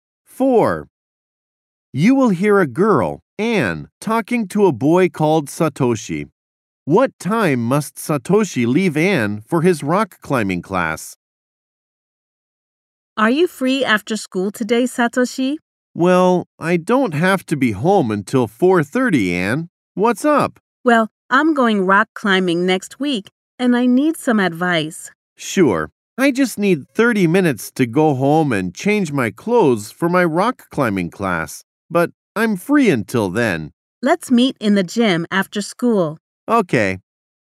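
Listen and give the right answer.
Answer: 4:00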